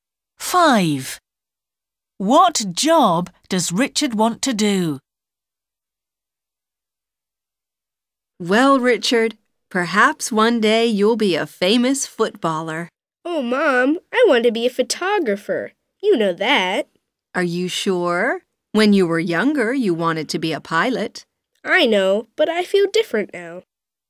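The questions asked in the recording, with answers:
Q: What job does Richard want to do?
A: photographer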